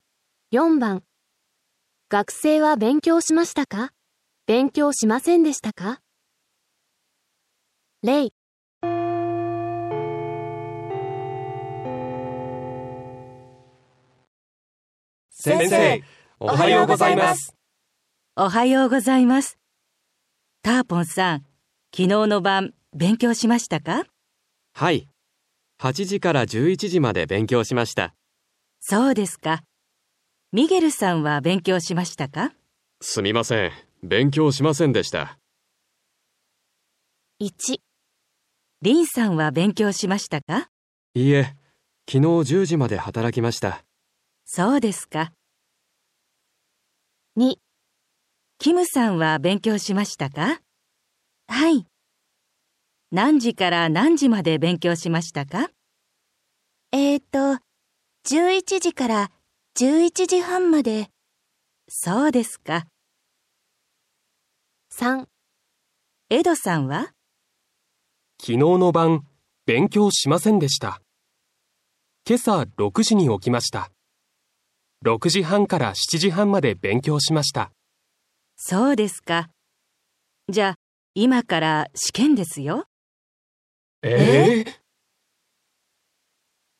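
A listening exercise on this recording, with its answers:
4. 学生は 勉強しましたか、勉強しませんでしたか。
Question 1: リン ( )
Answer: 勉強しませんでした

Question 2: キム ( )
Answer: 勉強しました

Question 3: エド ( )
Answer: 勉強しました(今朝6時半から7時半まで)

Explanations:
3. F: きのうの晩、勉強しませんでした。 けさ6時に起きました。6時半から 7時半まで 勉強しました。

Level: N5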